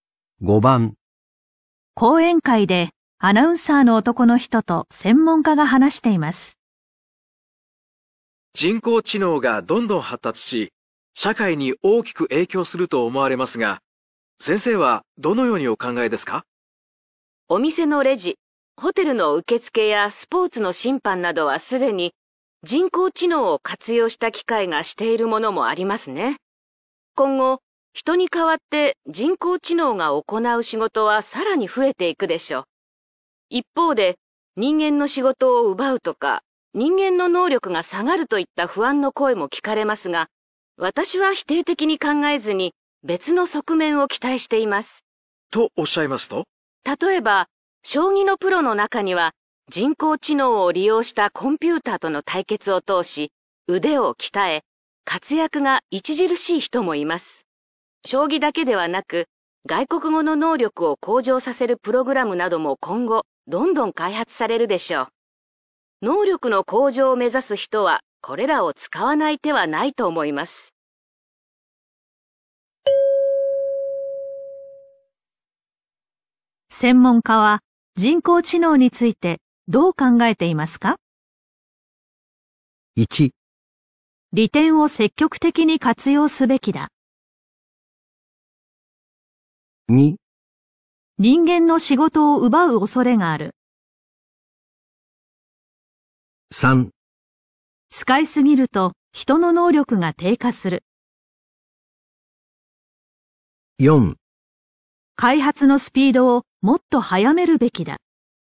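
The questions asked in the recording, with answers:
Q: 専門家は人工知能についてどう考えていますか?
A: 1: 利点を積極的に活用すべきだ。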